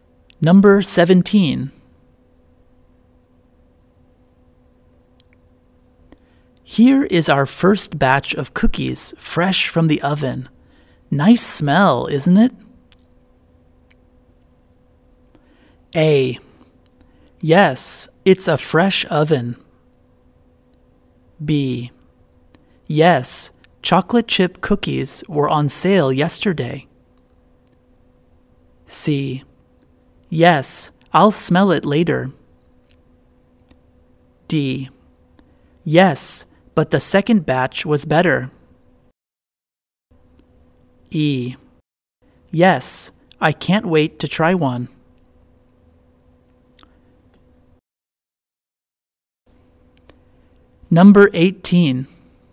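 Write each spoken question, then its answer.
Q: Here is our first batch of cookies fresh from the oven.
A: E: Yes, I can't wait to try one.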